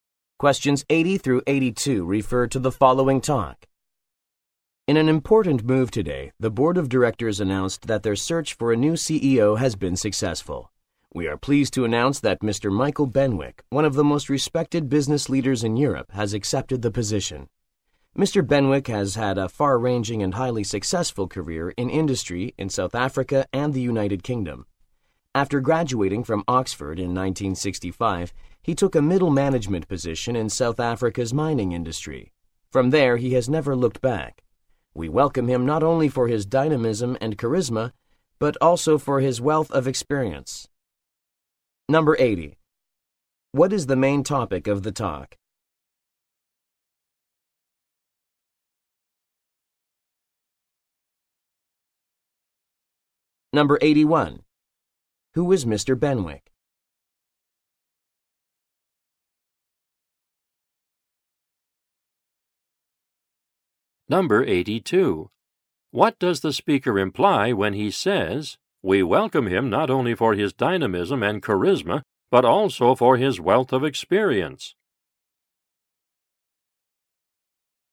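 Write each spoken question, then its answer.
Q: What is the main topic of the talk?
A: The appointment of a new CEO

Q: Who is Mr. Benwick?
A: A respected European business leader who will be the new CEO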